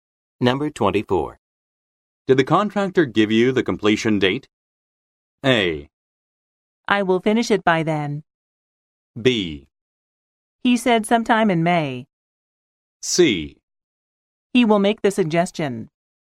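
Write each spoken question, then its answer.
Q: Did the contractor give you the completion date?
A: B: He said sometime in May.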